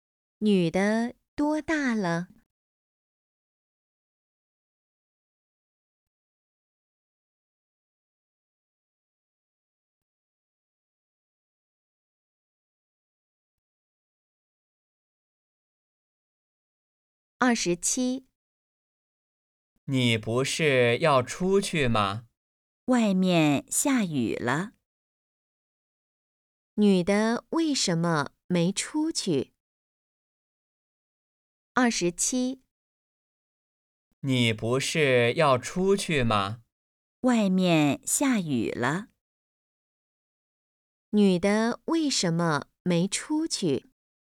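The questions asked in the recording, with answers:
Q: 女的为什么没出去?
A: 外面下雨了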